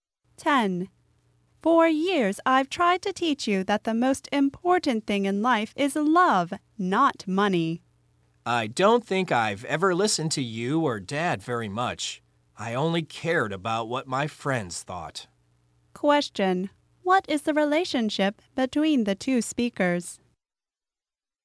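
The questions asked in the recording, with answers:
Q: what is the relationship between the two speakers?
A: Mother and child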